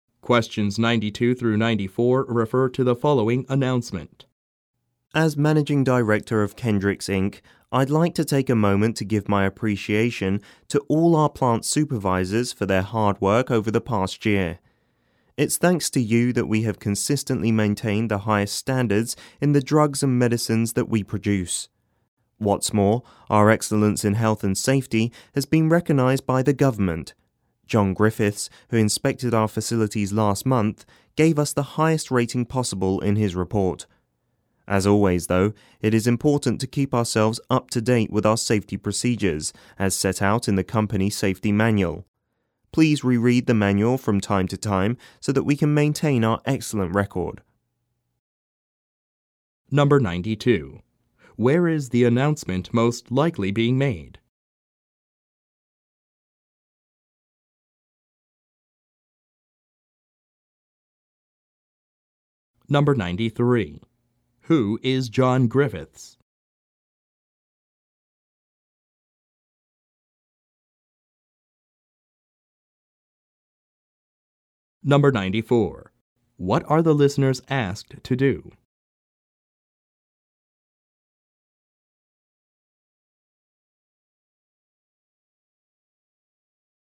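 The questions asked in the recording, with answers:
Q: Where is the announcement most likely being made?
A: At a pharmaceutical company (drug manufacturer)

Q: Who is John Griffiths?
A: A government safety inspector

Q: What are the listeners asked to do?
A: Reread the company safety manual from time to time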